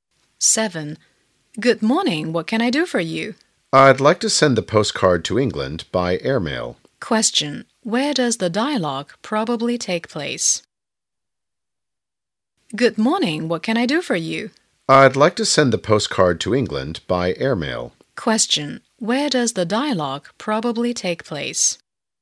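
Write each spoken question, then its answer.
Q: Where does the dialogue probably take place?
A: At a post office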